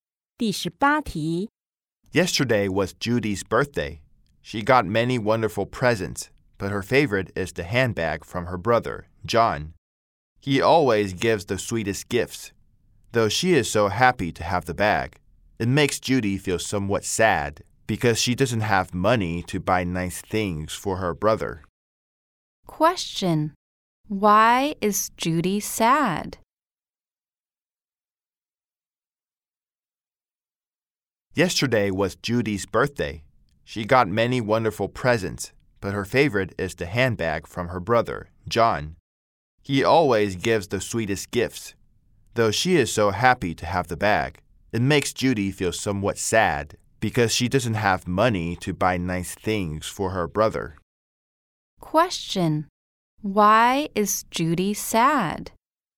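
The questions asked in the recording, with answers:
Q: Question. Why is Judy sad?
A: She has no money to buy nice things for her brother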